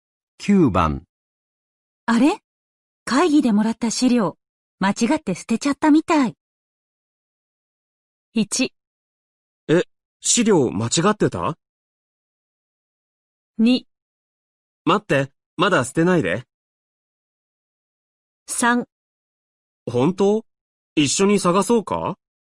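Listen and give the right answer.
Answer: 3: 本当?一緒に探そうか?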